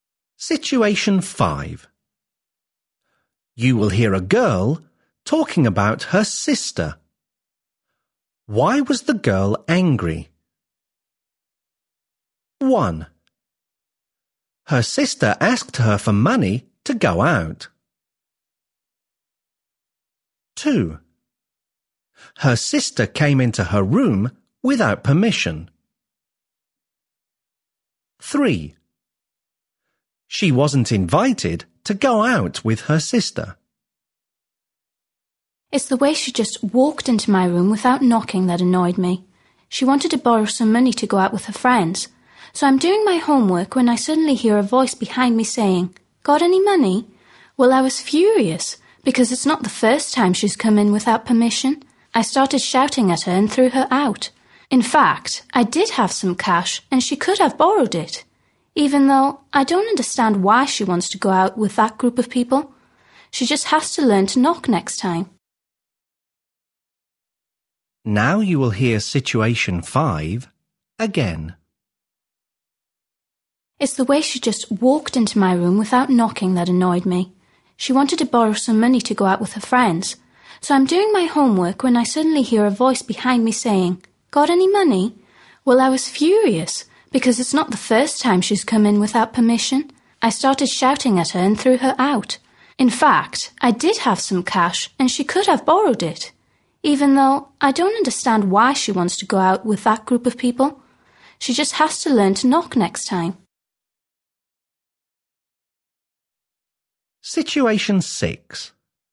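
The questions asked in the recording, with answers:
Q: Why was the girl angry?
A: 2: Her sister came into her room without permission.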